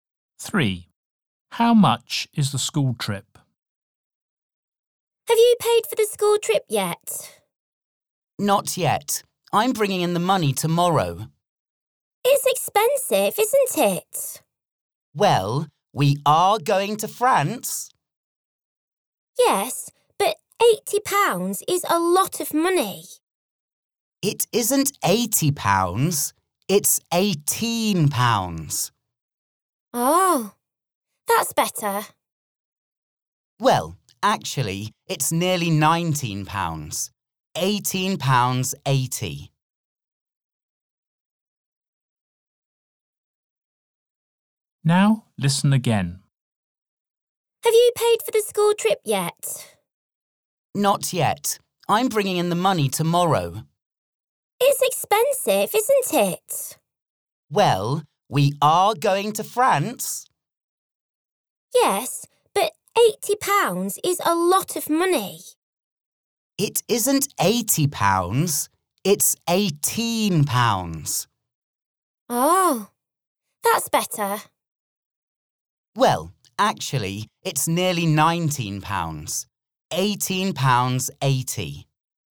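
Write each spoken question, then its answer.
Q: How much is the school trip?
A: £18.80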